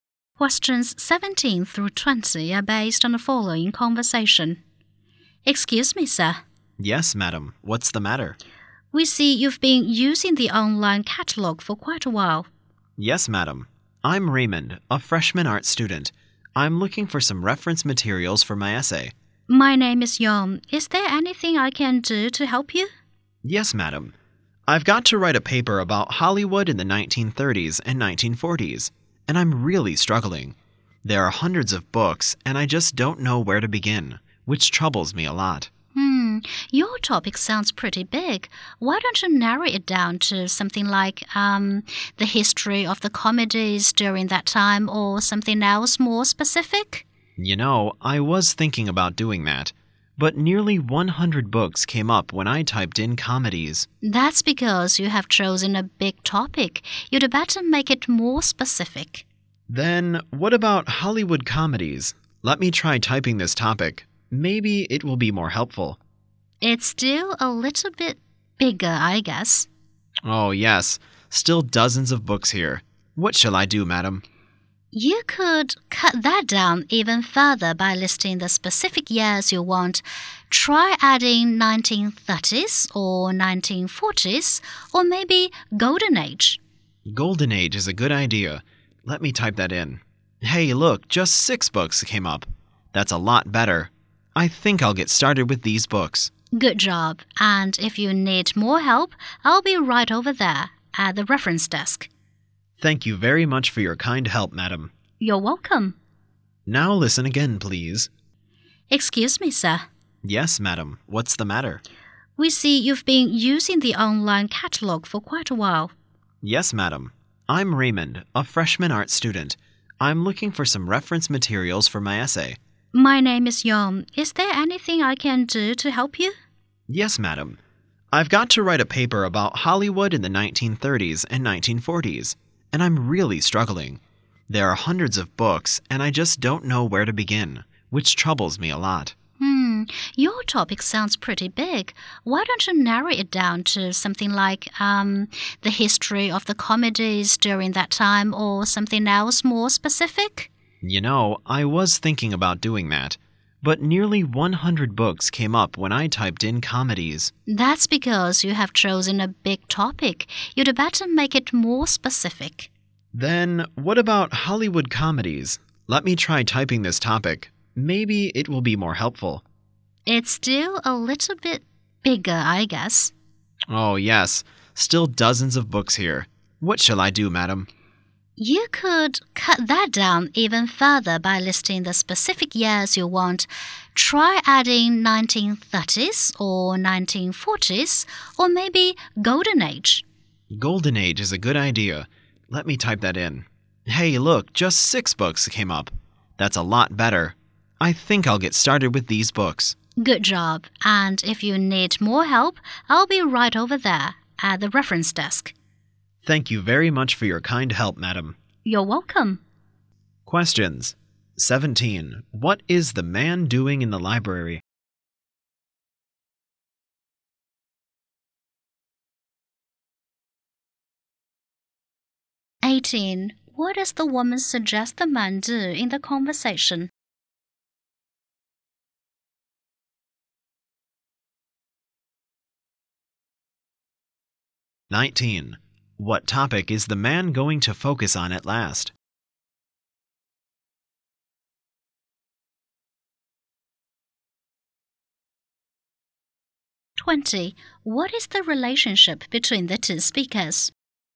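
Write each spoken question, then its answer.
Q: What is the man doing in the library?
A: Looking for reference materials for his essay

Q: What does the woman suggest the man do in the conversation?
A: Narrow down his topic

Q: What topic is the man going to focus on at last?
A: Hollywood comedies of the Golden Age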